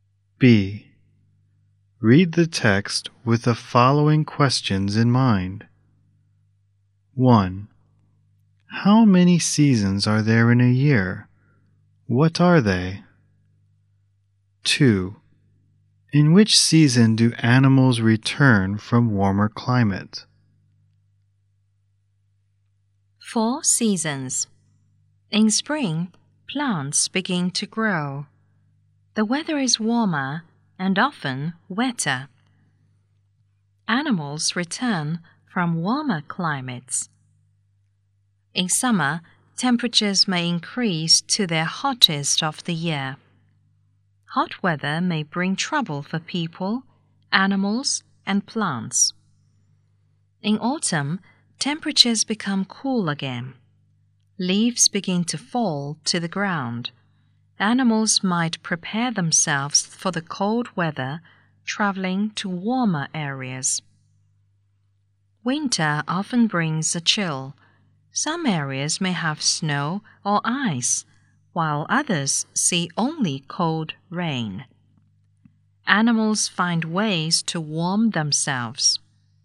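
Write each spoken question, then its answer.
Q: How many seasons are there in a year? What are they?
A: Four: spring, summer, autumn and winter

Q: In which season do animals return from warmer climate?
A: Spring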